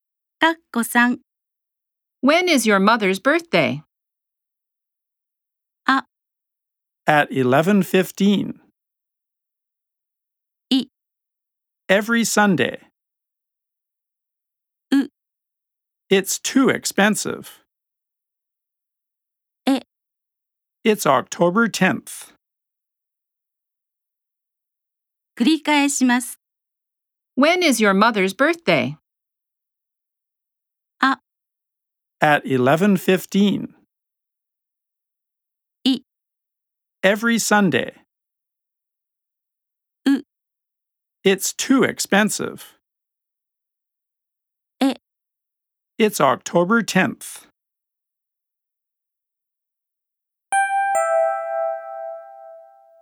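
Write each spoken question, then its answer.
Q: When is your mother's birthday?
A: え: It's October 10th.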